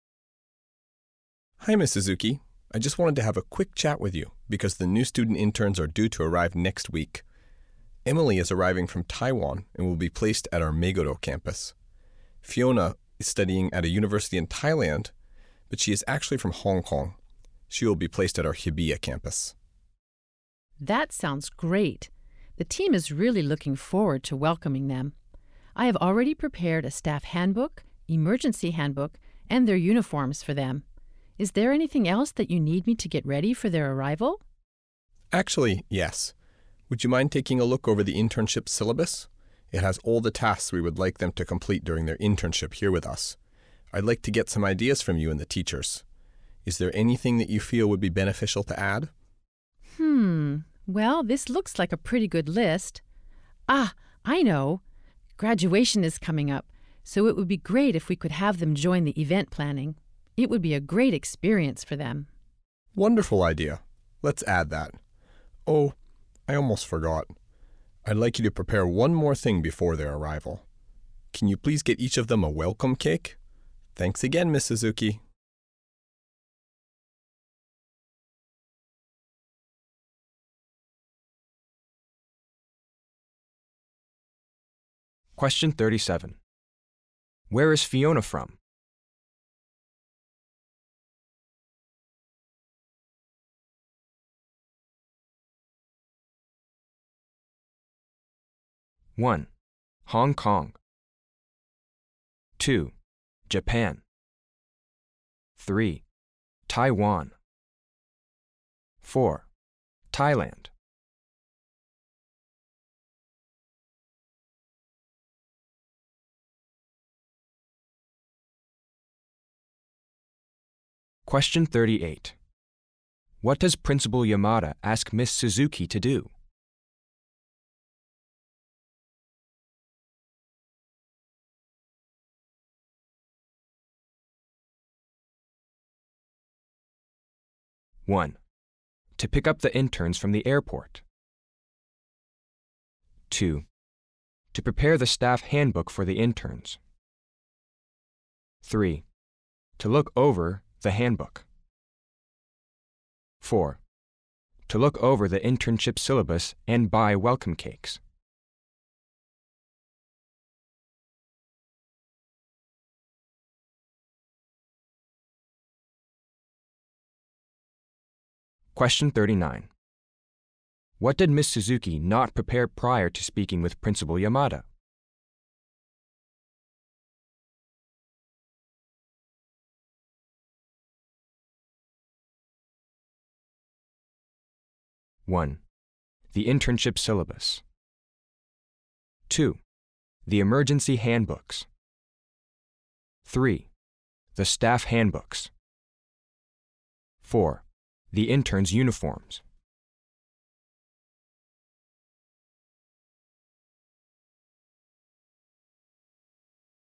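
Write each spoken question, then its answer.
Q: Where is Fiona from?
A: 1: Hong Kong

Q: What does Principal Yamada ask Miss Suzuki to do?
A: 4: to look over the internship syllabus and buy welcome cakes.

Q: What did Miss Suzuki not prepare prior to speaking with Principal Yamada?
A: 1: the internship syllabus.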